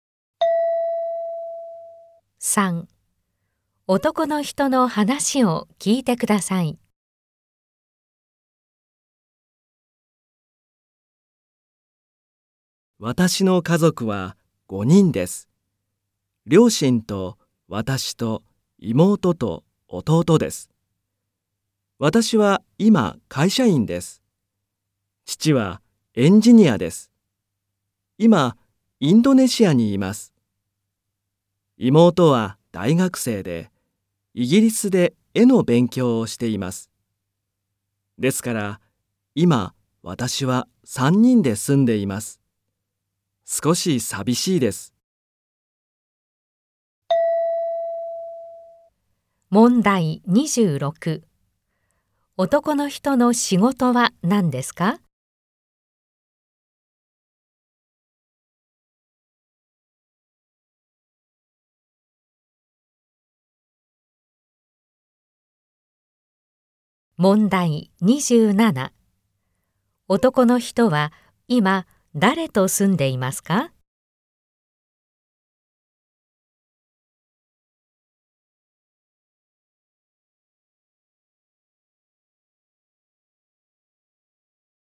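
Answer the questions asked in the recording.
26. 会社員
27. 母と弟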